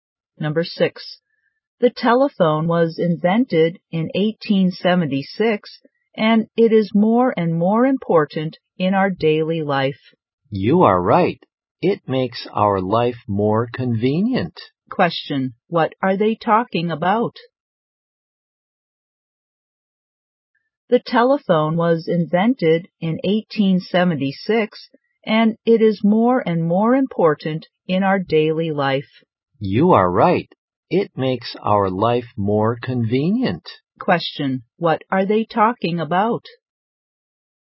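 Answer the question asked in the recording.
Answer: The telephone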